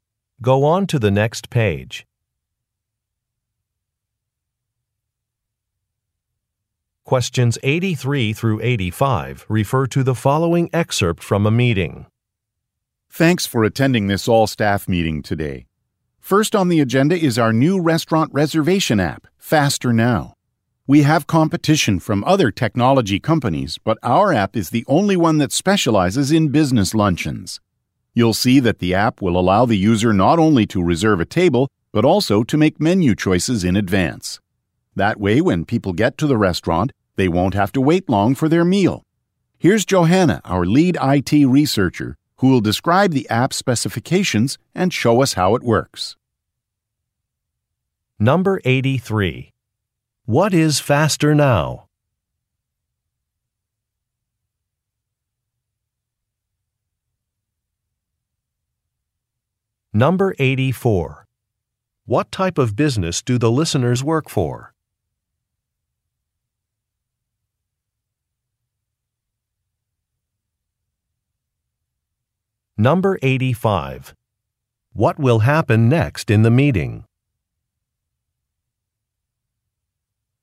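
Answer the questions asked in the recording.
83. A restaurant reservation app
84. A technology company
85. Johanna will demonstrate the app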